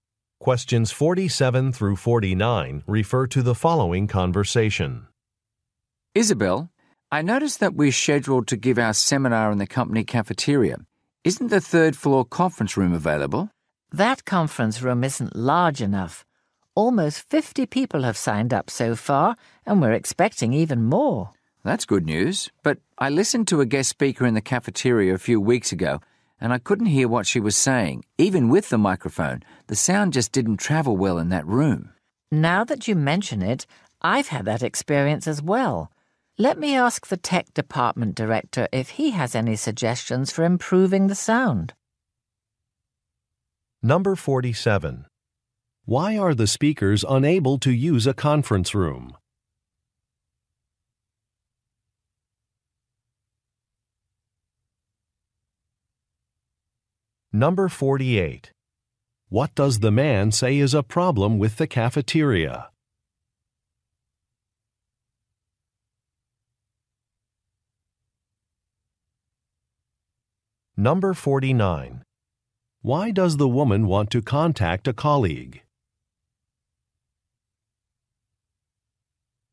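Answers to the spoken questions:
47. It isn't large enough
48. The sound doesn't travel well; hard to hear
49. To get suggestions for improving the sound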